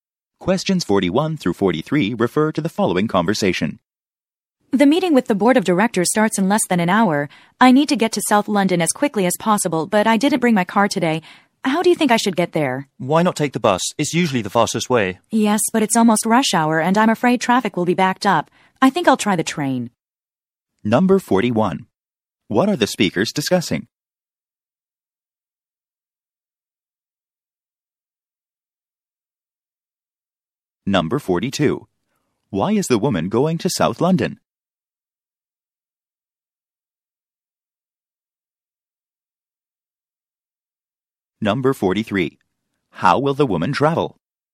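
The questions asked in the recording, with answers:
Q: What are the speakers discussing?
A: How the woman should get to South London

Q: Why is the woman going to South London?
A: To attend a meeting with the board of directors

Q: How will the woman travel?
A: By train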